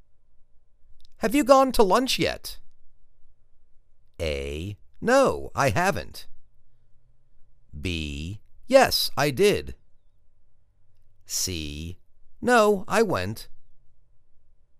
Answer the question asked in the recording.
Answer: No, I haven't.